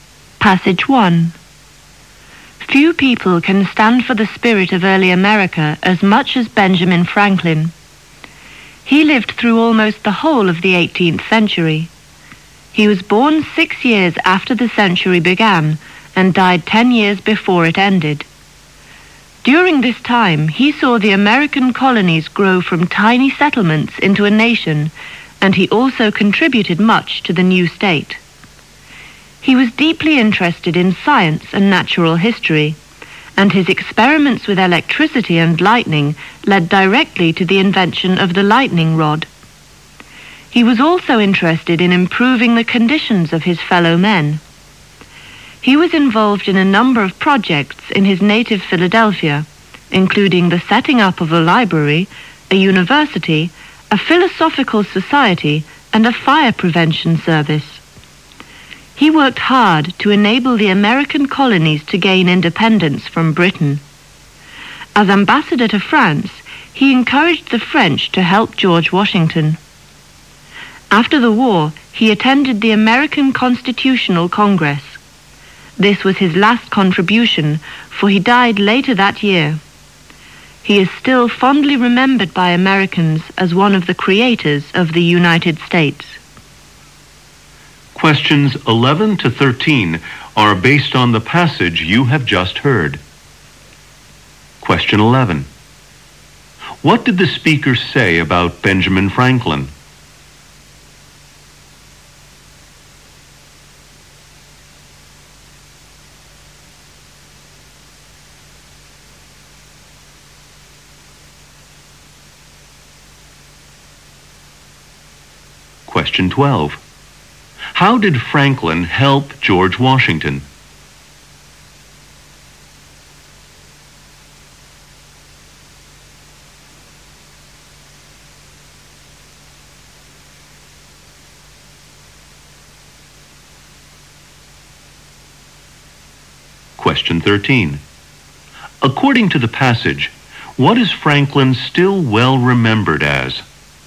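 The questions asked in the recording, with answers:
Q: How did Franklin help George Washington?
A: As ambassador to France, he encouraged the French to help Washington

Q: According to the passage, what is Franklin still well remembered as?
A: One of the creators of the United States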